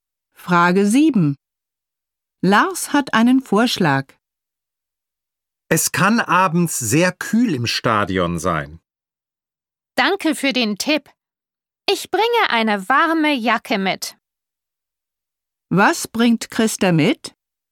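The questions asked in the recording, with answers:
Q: Was bringt Christa mit?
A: Eine warme Jacke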